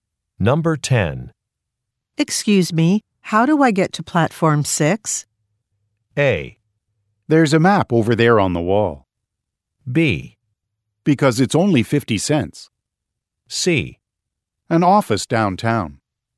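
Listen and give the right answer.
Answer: A: There's a map over there on the wall.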